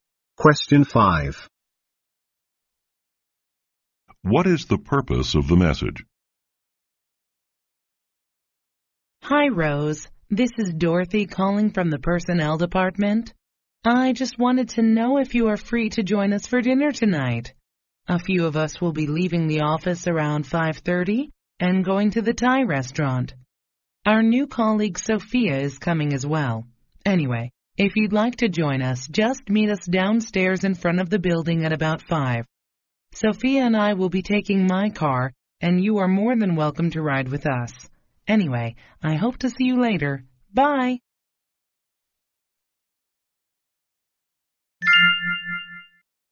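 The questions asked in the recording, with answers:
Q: What is the purpose of the message?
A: To invite Rose to dinner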